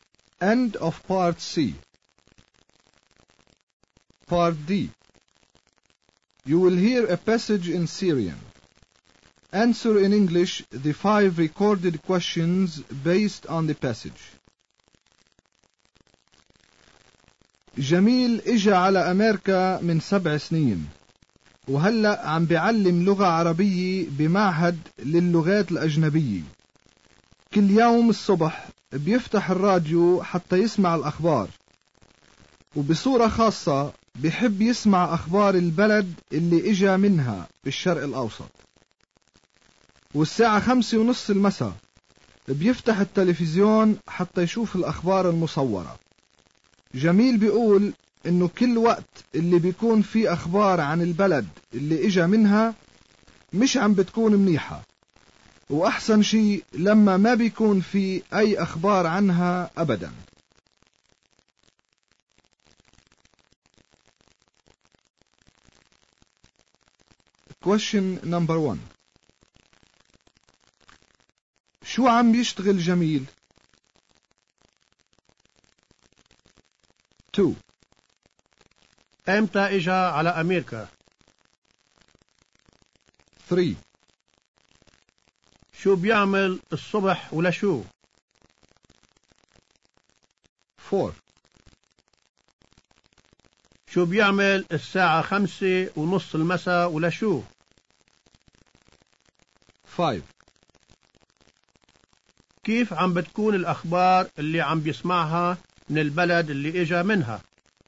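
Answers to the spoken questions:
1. عم بيعلم لغة عربية بمعهد للغات الأجنبية
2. من 7 سنين
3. بيفتح الراديو حتى يسمع الأخبار
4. بيفتح التلفزيون حتى يشوف الأخبار المصورة
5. مش منيحة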